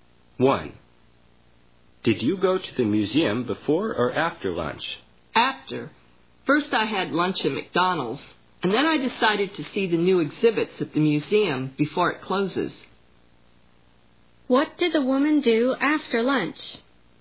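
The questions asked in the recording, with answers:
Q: What did the woman do after lunch?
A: She went to see the new exhibits at the museum.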